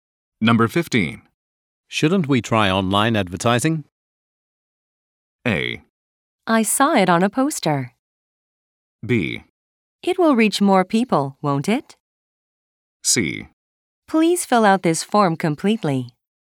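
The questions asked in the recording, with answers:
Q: Shouldn't we try online advertising?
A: B: It will reach more people, won't it?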